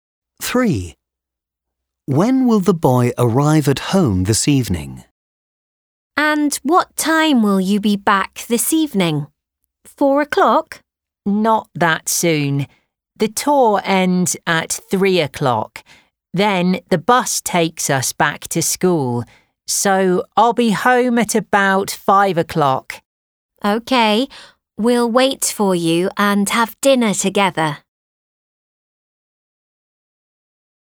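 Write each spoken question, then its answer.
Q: When will the boy arrive at home this evening?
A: At about 5 o'clock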